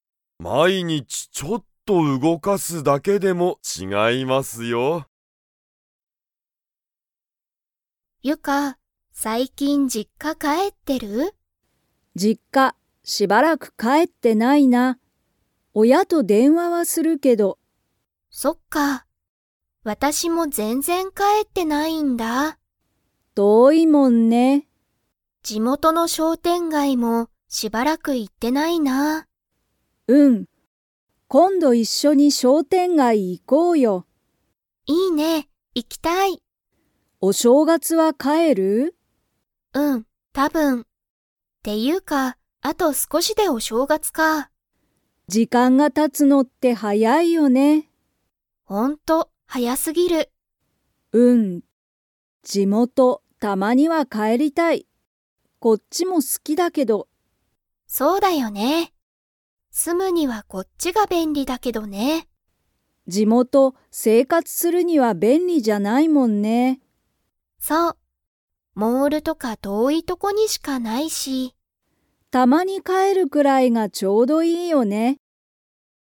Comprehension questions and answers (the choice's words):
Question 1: ユカは最近さいきん実家じっかに帰かえってますか?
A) はい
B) いいえ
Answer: いいえ

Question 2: エミは、たぶん に実家じっかに帰かえる。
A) 明日あした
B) 土曜日どようび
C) お正月しょうがつ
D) 一週間いっしゅうかん後ご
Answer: お正月しょうがつ

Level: Level 4